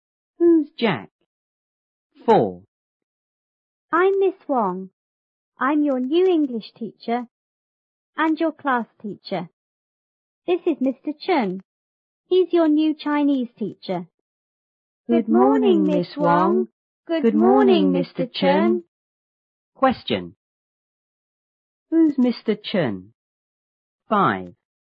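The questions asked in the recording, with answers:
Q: Who's Mr. Chen?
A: The new Chinese teacher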